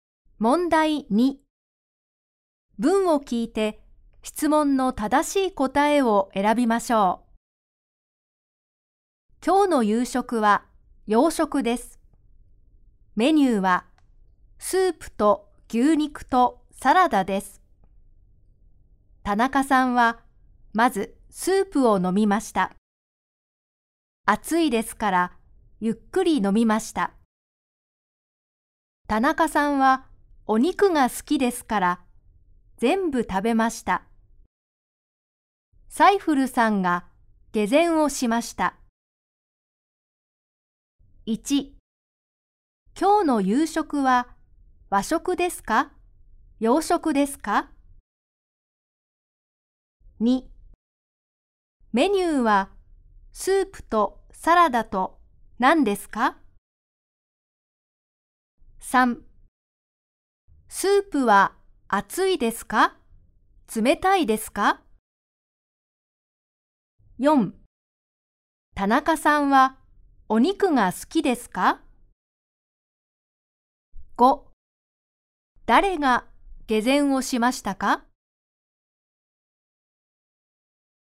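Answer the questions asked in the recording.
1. 洋食です
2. 牛肉
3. 熱いです
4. はい、好きです
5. サイフルさん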